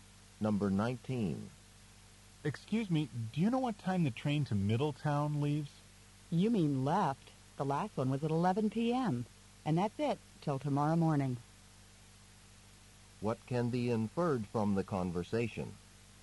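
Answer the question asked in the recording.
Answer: The man missed the last train; there is none until tomorrow morning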